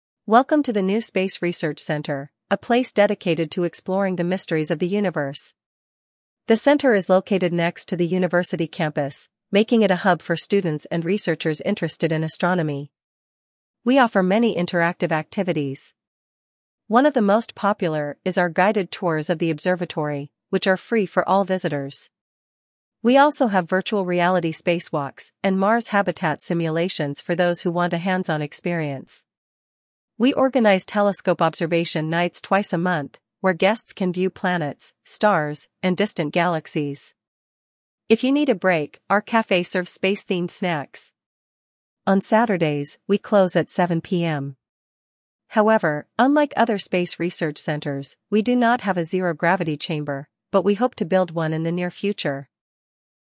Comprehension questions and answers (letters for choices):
1. Вы услышите сообщение. Для каждого предложения А–Е выберите один правильный вариант ответа из четырёх предложенных (1, 2, 3 или 4). Вы услышите запись дважды. При повторном прослушивании проверьте себя.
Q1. Where is the new space research center located?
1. Near the science museum.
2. Next to the university campus.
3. Behind the government building.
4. Opposite the technology park.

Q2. What is free for visitors?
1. Space simulation training.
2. Guided tours of the observatory.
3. Astronomy workshops.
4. Virtual reality spacewalks.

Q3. How often do they organize telescope observation nights?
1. Once a week.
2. Twice a month.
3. Every two months.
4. Once a year.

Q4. What time does the center close on Saturdays?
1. 1 PM.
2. 4 PM.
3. 7 PM.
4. 10 PM.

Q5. What is NOT available at the space research center?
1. A planetarium.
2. A Mars habitat simulator.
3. A zero-gravity chamber.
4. A space mission control room.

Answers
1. 2
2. 2
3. 2
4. 3
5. 3

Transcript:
«Welcome to the new space research center, a place dedicated to exploring the mysteries of the universe! The center is located next to the university campus, making it a hub for students and researchers interested in astronomy.
We offer many interactive activities. One of the most popular is our guided tours of the observatory, which are free for all visitors. We also have virtual reality spacewalks and Mars habitat simulations for those who want a hands-on experience.
We organize telescope observation nights twice a month, where guests can view planets, stars, and distant galaxies. If you need a break, our café serves space-themed snacks. On Saturdays, we close at 7 PM.
However, unlike other space research centers, we do not have a zero-gravity chamber, but we hope to build one in the near future!»

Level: 8 класс